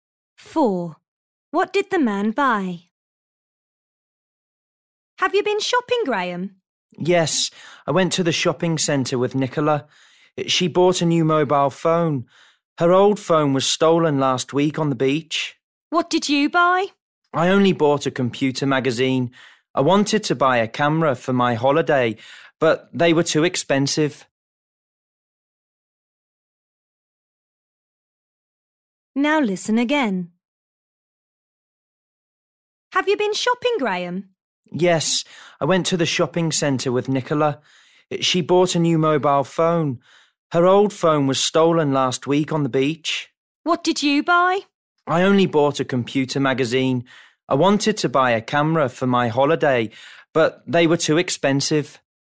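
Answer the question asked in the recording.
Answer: A computer magazine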